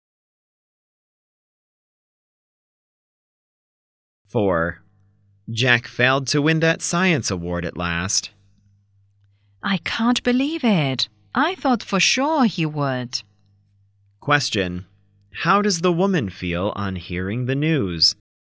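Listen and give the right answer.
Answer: Surprised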